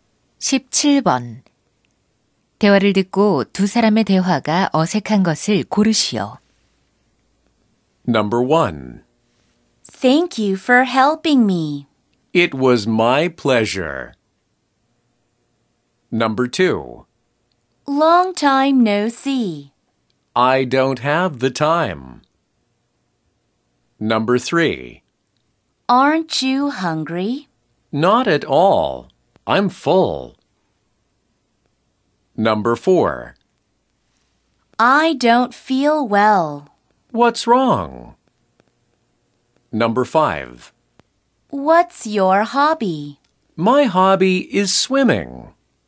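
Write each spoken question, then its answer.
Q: 대화를 듣고 두 사람의 대화가 어색한 것을 고르시오.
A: 2: Long time no see. / I don't have the time.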